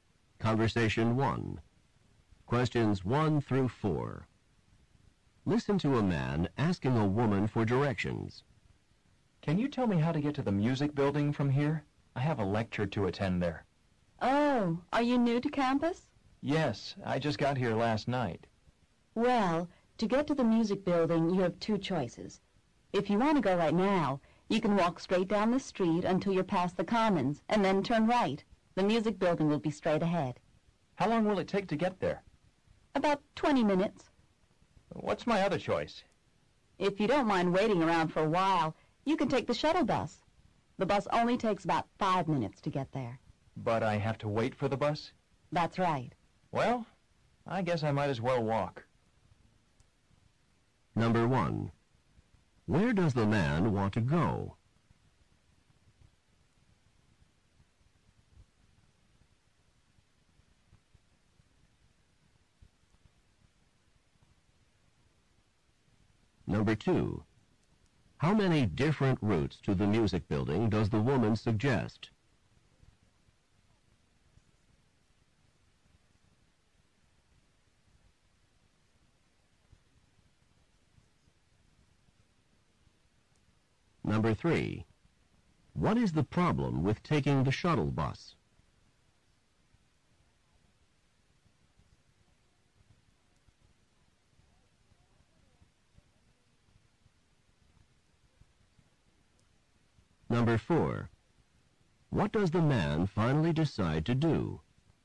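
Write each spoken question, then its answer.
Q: Where does the man want to go?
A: To the music building

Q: How many different routes to the music building does the woman suggest?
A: Two

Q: What is the problem with taking the shuttle bus?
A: He has to wait for the bus

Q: What does the man finally decide to do?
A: Walk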